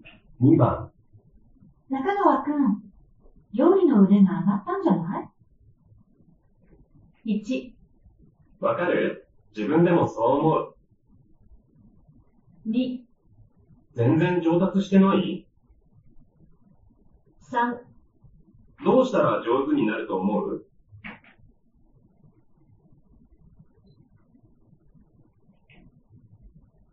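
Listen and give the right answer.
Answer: 1: わかる?自分でもそう思う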